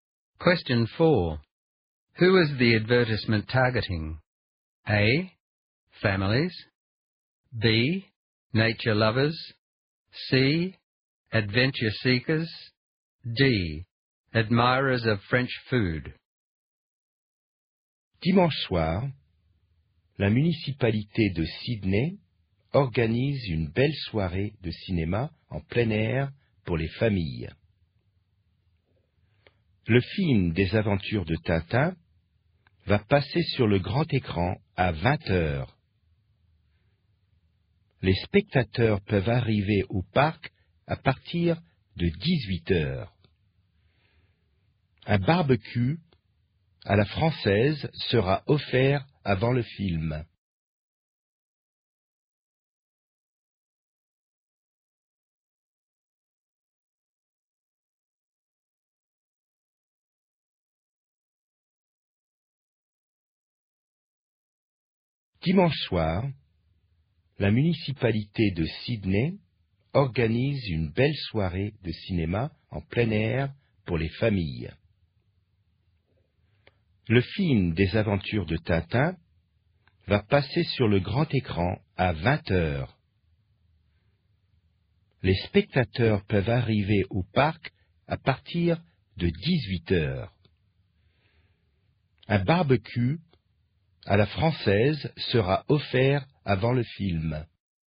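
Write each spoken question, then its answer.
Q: Who is the advertisement targeting?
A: A: Families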